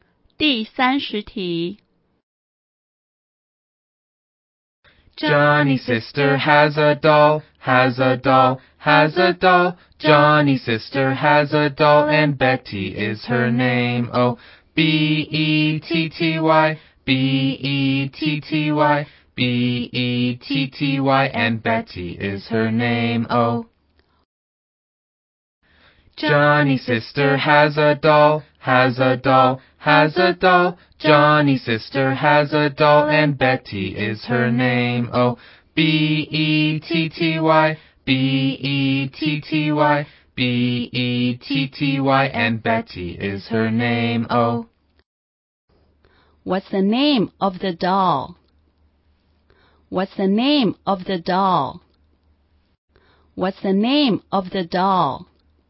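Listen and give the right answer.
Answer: Betty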